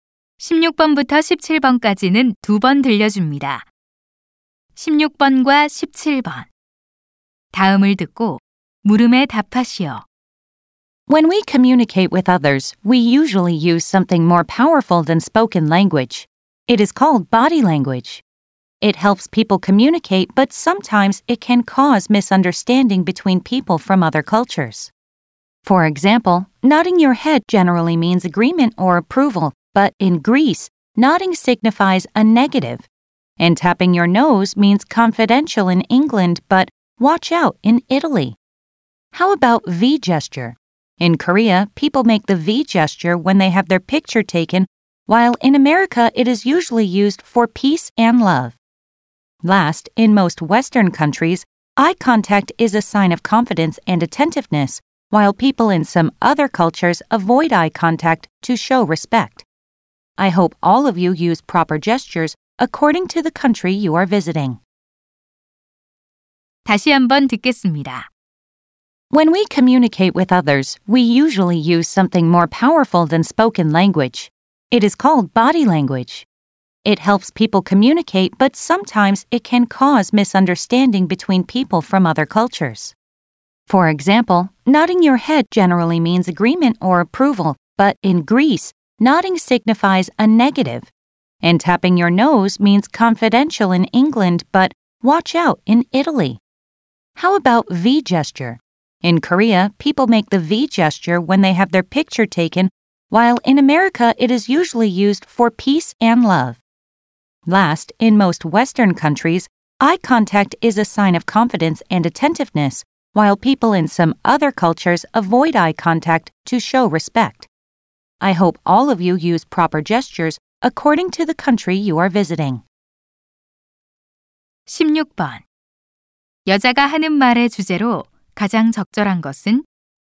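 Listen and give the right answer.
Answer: 문화에 따라 다른 바디랭귀지의 의미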